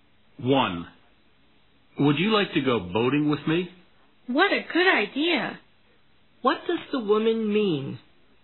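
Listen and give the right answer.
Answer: She would like to go boating with the man.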